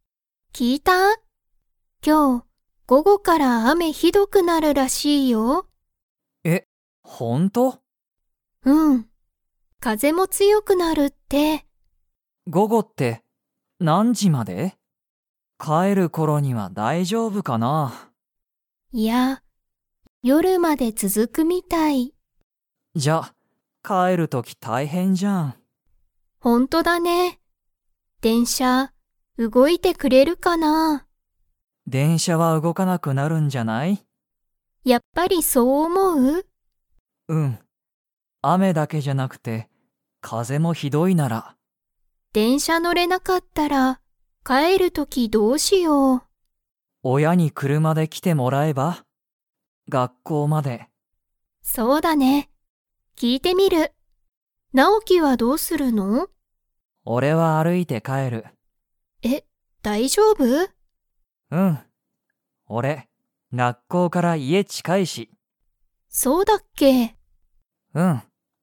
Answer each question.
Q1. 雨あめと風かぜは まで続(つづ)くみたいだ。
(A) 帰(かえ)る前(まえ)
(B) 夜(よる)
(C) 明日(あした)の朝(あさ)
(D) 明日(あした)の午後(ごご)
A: 夜(よる)

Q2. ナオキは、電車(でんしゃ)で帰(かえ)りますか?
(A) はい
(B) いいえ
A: いいえ

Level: Level 3

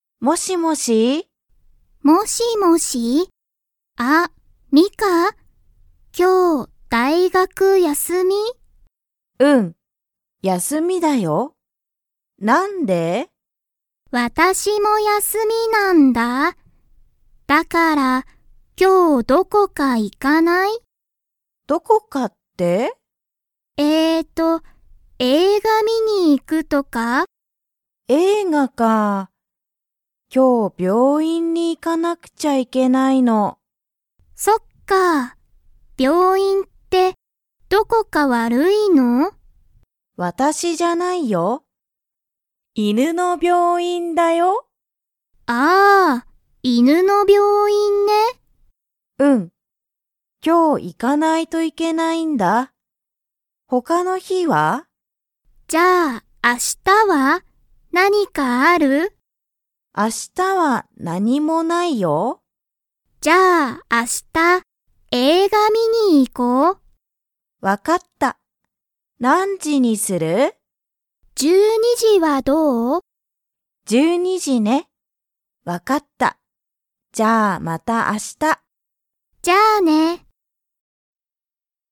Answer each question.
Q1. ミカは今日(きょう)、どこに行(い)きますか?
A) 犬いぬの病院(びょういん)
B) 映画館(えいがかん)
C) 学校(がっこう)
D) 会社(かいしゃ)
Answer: 犬いぬの病院(びょういん)

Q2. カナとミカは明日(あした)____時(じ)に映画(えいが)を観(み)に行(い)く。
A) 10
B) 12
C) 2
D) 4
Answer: 12

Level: Level 2

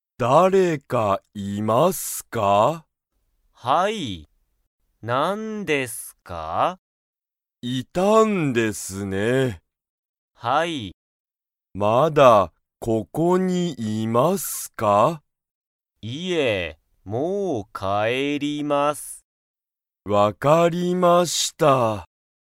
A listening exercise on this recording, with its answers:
Comprehension Quiz (Skip if you don't understand the conversation yet)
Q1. 会社(かいしゃ)にまだ、誰(だれ)かいますか?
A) はい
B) いいえ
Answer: はい

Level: Level 1

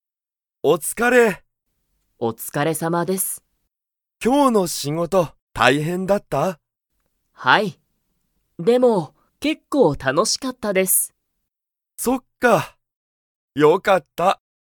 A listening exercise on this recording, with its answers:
今日きょうの仕事しごとは、____。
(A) 少(すこ)しだけ楽(たの)しかった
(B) 全然大変(ぜんぜんたいへん)じゃなかった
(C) 結構楽(けっこうたの)しかった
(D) あまり大変(たいへん)じゃなかった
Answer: 結構楽(けっこうたの)しかった

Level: Level 1

